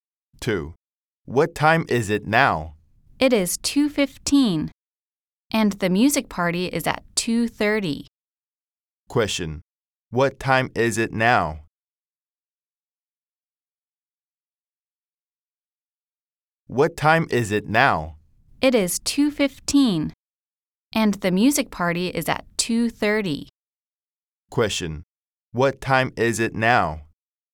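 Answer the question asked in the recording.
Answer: 2:15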